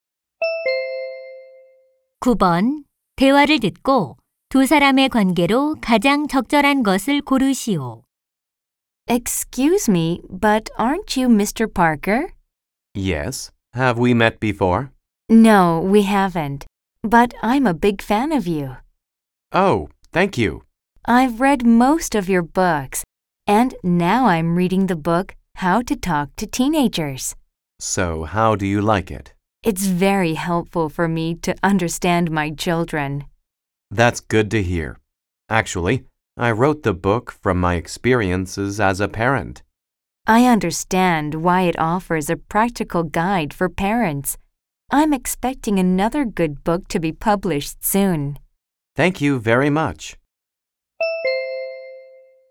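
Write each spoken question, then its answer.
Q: 대화를 듣고 두 사람의 관계로 가장 적절한 것을 고르시오.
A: 작가 - 독자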